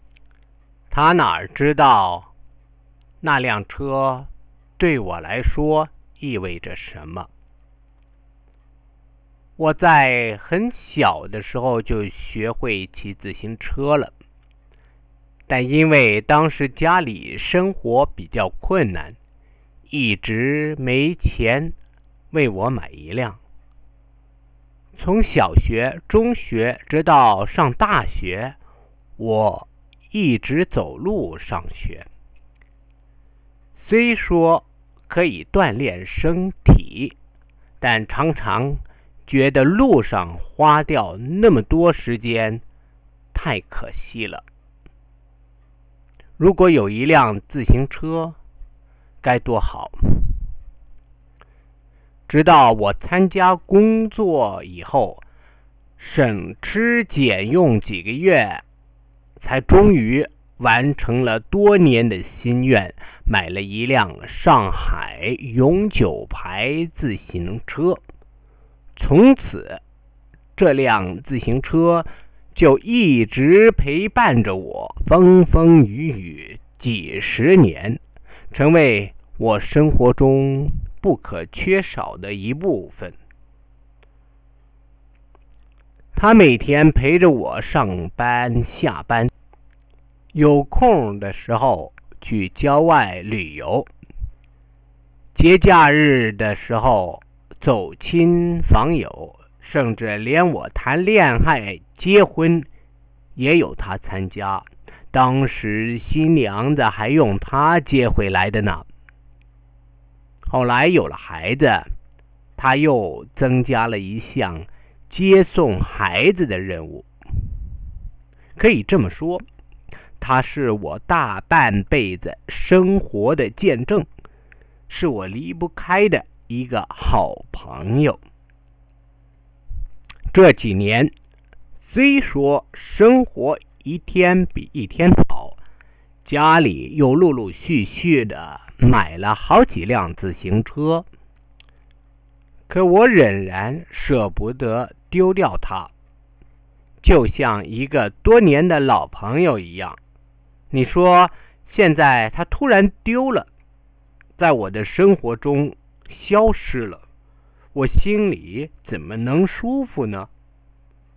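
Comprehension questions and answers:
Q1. Describe the history of the lost bike. 40%.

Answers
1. He couldn't afford a bike as a child and walked to school. After he started work, he saved for months to buy a Shanghai Forever bike. For decades it took him to work, on trips and visits, to fetch his bride, and to take his child to and from school. He kept it even after the family bought other bikes.

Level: Second year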